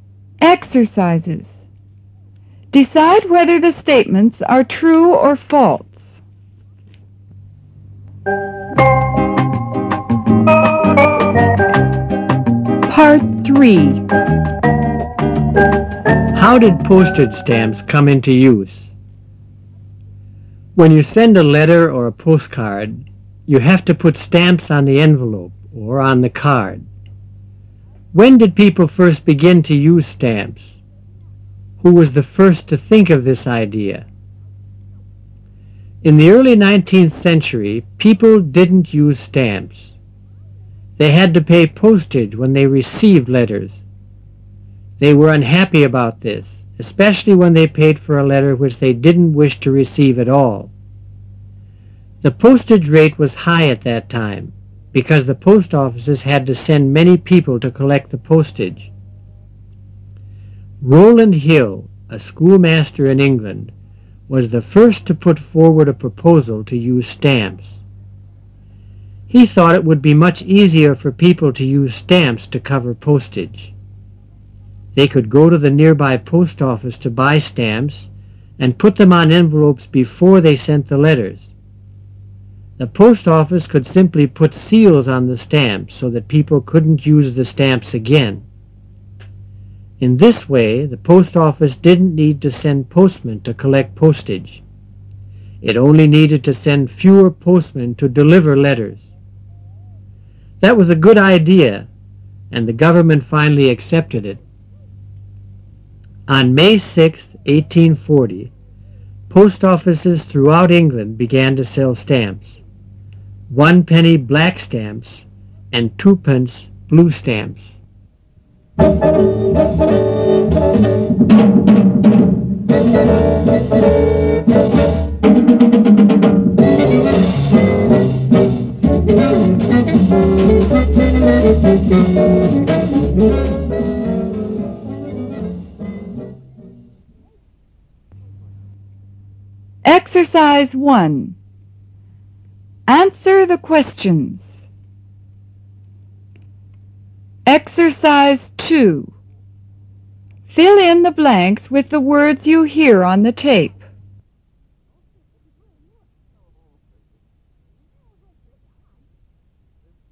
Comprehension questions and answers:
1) Rowland Hill, a schoolmaster in England, was the first to____ forward a proposal to____ stamps.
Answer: put/use

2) He thought it would be much easier for people to use stamps to____ postage.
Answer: cover

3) They could ____ to the nearby post office to____ stamps and put them on envelopes before they____ the letters.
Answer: go/buy/sent

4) The post office could simply____ seals on the stamps so that people could not use the stamps again.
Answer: put

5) In this way, the post office did not need to send postmen to____ postage.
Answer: collect

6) It only needed to send fewer postmen to____ letters.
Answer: deliver

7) That was a good idea and the government finally____ it.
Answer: accepted

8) Why were people unhappy to pay postage for letters in the early nineteenth century?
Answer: Because they had to pay for a letter which they did not wish to receive at all.

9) Why was the postage rate high at that time?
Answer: Because the post offices had to send many people to collect the postage.

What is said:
Glerk: It shouldn't take more than two or three days at most.
If a letter is going to some small town in the interior of the country, it may take a little longer.
John: How long does regular mail take ?
Clerk: Regular mail to Venezuela will take anywhere from three to four weeks. It goes by boat and the sailings are irregular. Sometimes there are also other delays caused by weather conditions, etc.
How Did Postage Stamps Come Into Use (1′44′′)
When you send a letter or a postcard, you have to put stamps on the envelope or on the card. When did people first begin to use stamps ? Who was the first to think of this idea ?
In the early nineteenth century, people did not use stamps. They had to pay postage when they received letters. They were unhappy about this, especially when they paid for a letter which they did not wish to receive at all. The postage rate was high at that time, because the post offices had to send many people to collect the postage.
Rowland Hill, a schoolmaster in England, was the first to put forward a proposal to use stamps. He thought it would be much easier for people to use stamps to cover postage. They could go to the nearby post office to buy stamps and put them on envelopes before they sent the letters. The post office could simply put seals on the stamps so that people could not use the stamps again. In this way, the post office did not need to send postmen to collect postage. It only needed to send fewer postmen to deliver letters. That was a good idea and the government finally accepted it.
On May 6, 1840, post offices throughout England began to sell stamps----"One Penny" black stamps and "Two Pence" blue stamps.